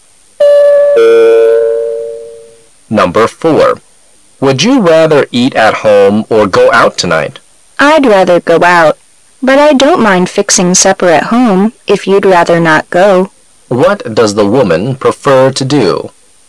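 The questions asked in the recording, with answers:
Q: What does the woman prefer to do?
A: Go out to eat.

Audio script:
[解析] M: Would you rather eat at home or go out tonight? W: I'd rather go out, but I don't mind fixing supper at home if you'd rather not go. Q: What does the woman prefer to do?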